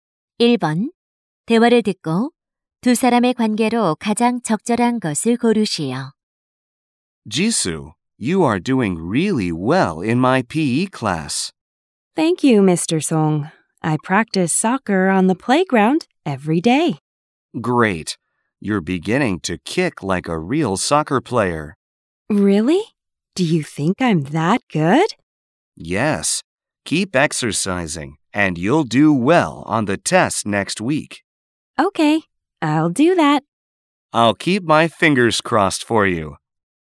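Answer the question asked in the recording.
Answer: 체육 교사와 학생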